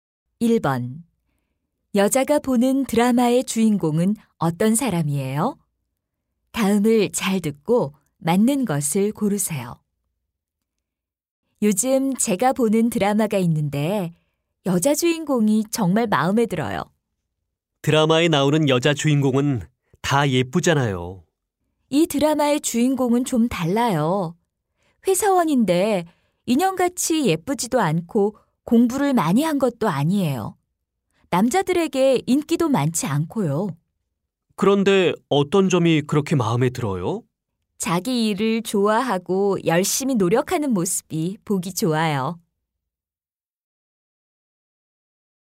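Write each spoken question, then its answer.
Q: 여자가 보는 드라마의 주인공은 어떤 사람이에요?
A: 인형같이 예쁘지 않은 평범한 회사원인데, 자기 일을 좋아하고 열심히 노력하는 사람이에요.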